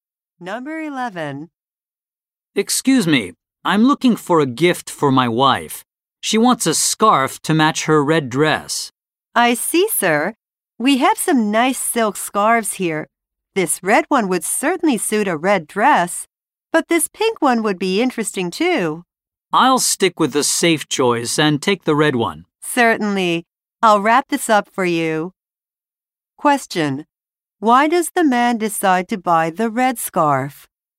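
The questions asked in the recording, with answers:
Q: Why does the man decide to buy the red scarf?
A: It is the safe choice to match his wife's red dress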